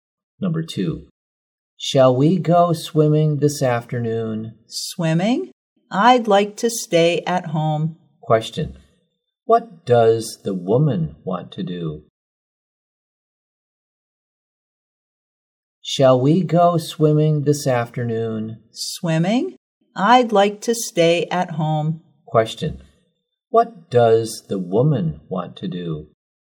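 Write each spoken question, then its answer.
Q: Question, what does the woman want to do?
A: Stay at home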